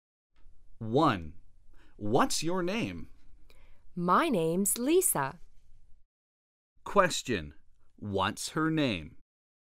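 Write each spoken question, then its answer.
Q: What's her name?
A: Lisa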